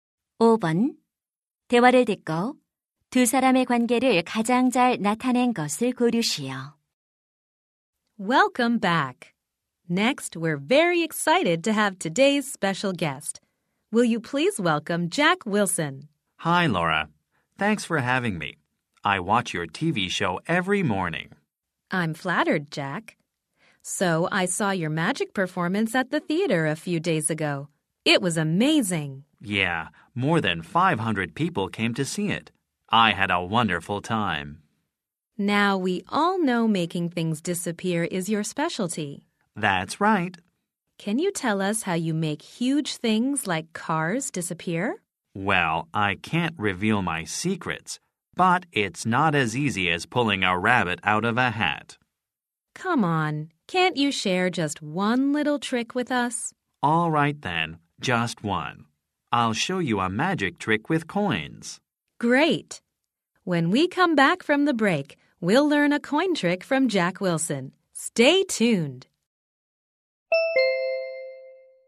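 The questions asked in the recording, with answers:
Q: 대화를 듣고 두 사람의 관계를 가장 잘 나타낸 것을 고르시오.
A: TV 쇼 진행자 - 마술사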